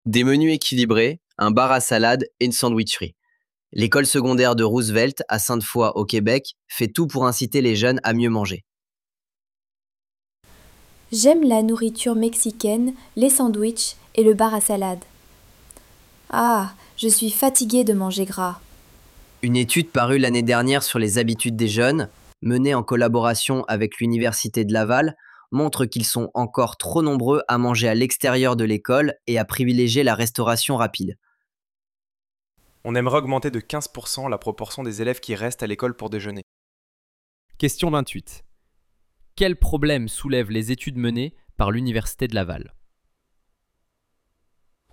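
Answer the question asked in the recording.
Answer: Trop de jeunes mangent hors de l'école et préfèrent la restauration rapide.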